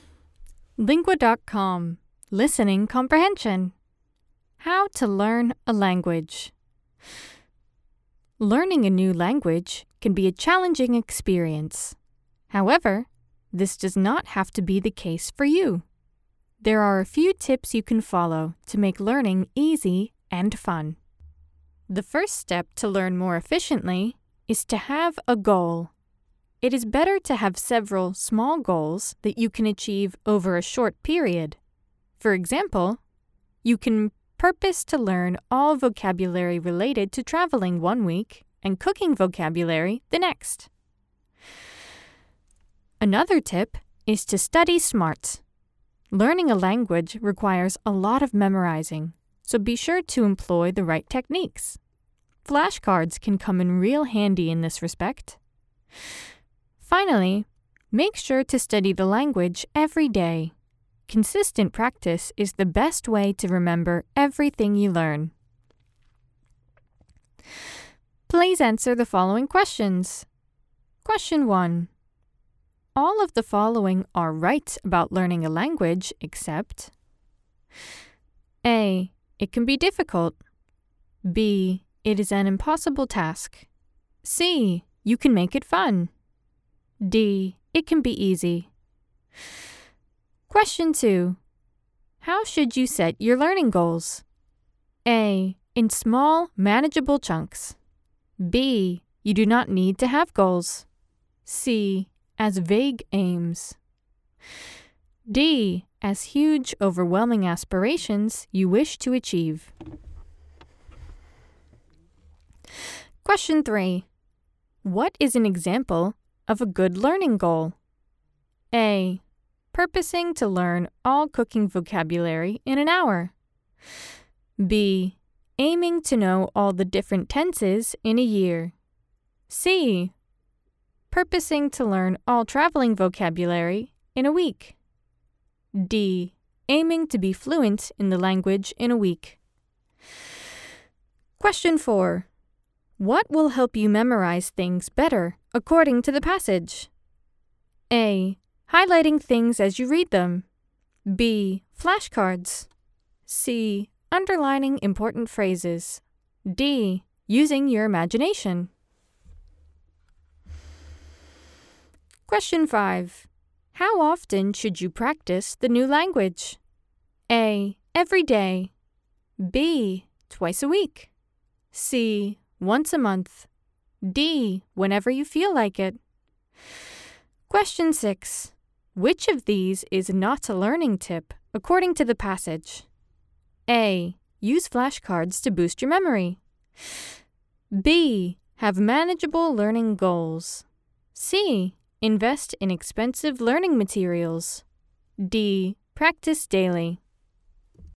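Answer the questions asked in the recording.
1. B: It is an impossible task.
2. A: In small, manageable chunks.
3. C: Purposing to learn all traveling vocabulary in a week.
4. B: Flashcards.
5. A: Every day.
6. C: Invest in expensive learning materials.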